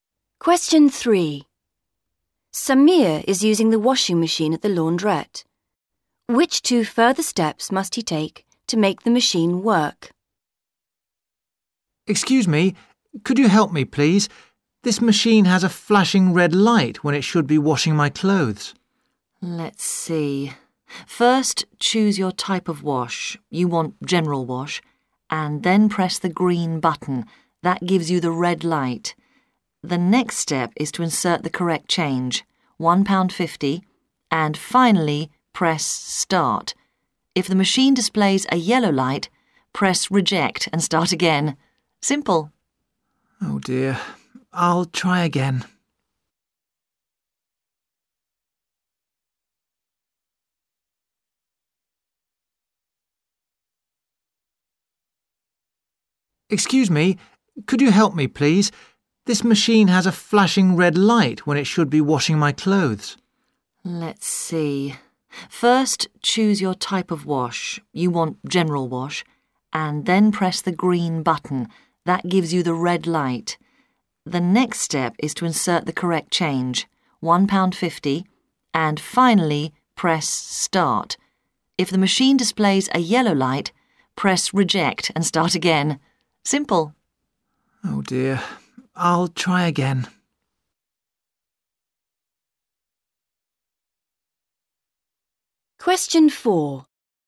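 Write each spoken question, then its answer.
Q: Which 2 further steps must he take to make the machine work?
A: Insert the correct change (£1.50) and press start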